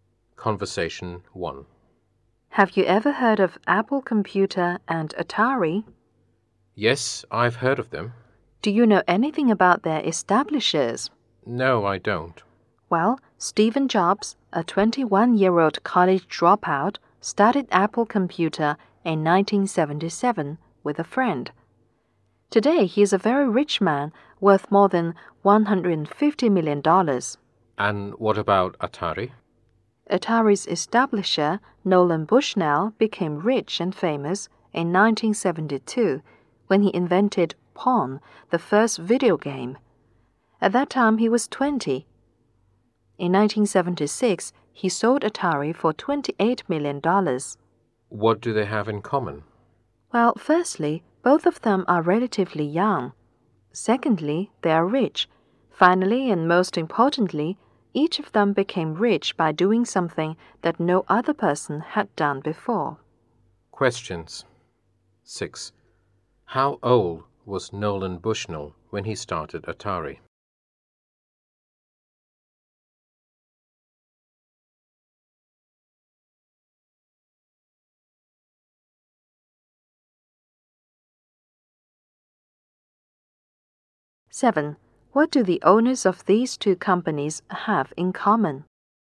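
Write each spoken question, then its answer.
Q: What do the owners of these two companies have in common?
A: They are young, rich, and became rich by doing something no one had done before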